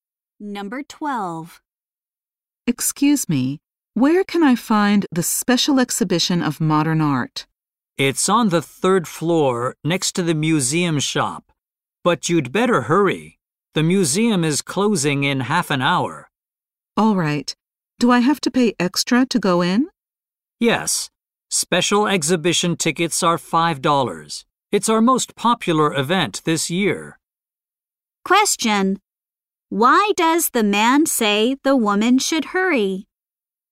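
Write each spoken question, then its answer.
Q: Why does the man say the woman should hurry?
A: The museum closes in half an hour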